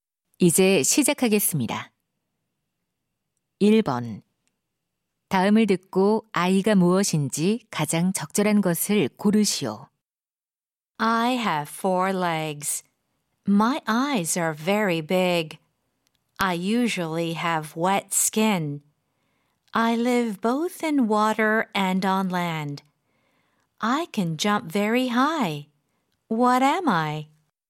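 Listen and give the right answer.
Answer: 개구리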